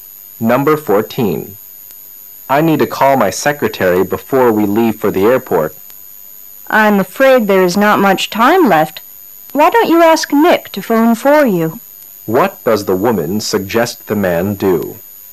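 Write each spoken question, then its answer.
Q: What does the woman suggest the man do?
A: Ask Nick to call his secretary for him.

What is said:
[解析] M: I need to call my secretary before we leave for the airport. W: I'm afraid there is not much time left, why don't you ask Nick to phone for you? Q: What does the woman suggest the man do?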